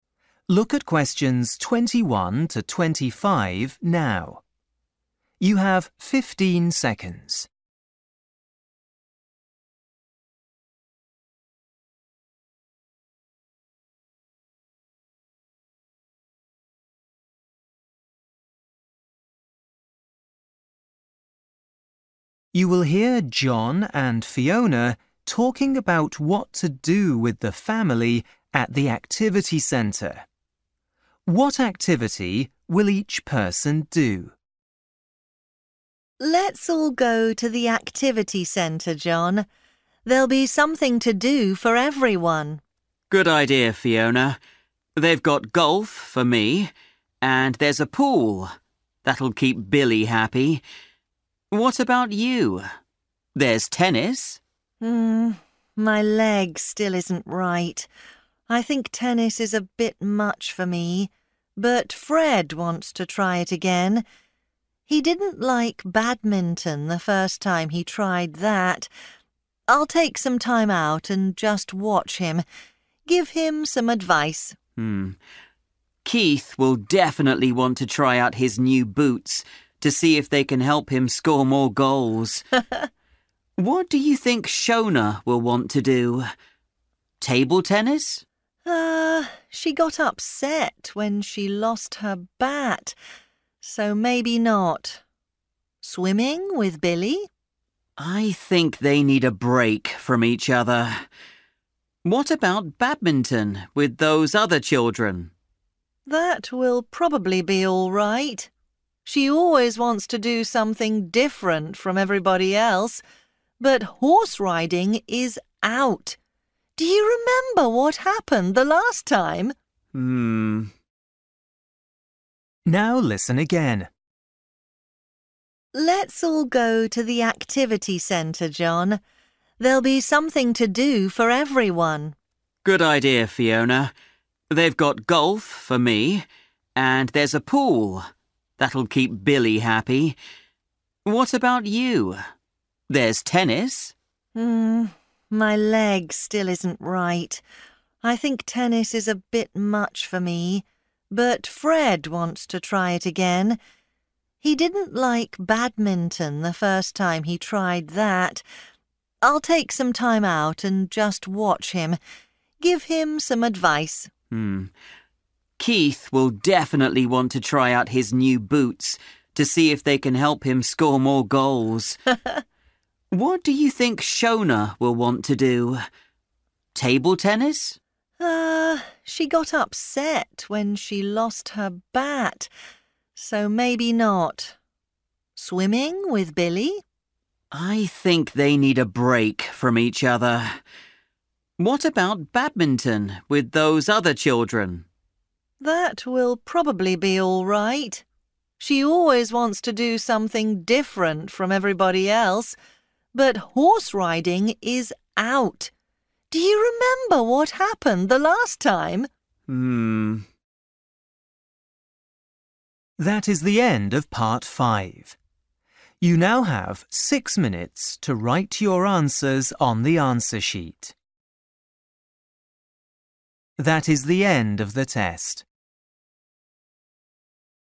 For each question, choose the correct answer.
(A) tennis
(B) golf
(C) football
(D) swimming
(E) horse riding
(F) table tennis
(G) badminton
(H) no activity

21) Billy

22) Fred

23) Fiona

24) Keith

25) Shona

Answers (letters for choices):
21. D
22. A
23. H
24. C
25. G

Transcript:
Fiona: Let's all go to the activity centre, John. There'll be something to do for everyone.
John: Good idea, Fiona. They've got golf for me, and there's a pool. That'll keep Billy happy. What about you? There's tennis.
Fiona: My leg still isn't right. I think tennis is a bit much for me, but Fred wants to try it again. He didn't like badminton the first time he tried that. I'll take some time out and just watch him – give him some advice.
John: Keith will definitely want to try out his new boots to see if they can help him score more goals. What do you think Shona will want to do?
Fiona: Er, she got upset when she lost her bat. So maybe not. Swimming with Billy?
John: I think they need a break from each other. What about badminton with those other children?
Fiona: That will probably be all right. She always wants to do something different from everybody else. But horse-riding is out! Do you remember what happened the last time?
Now listen again.

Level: KET (A2)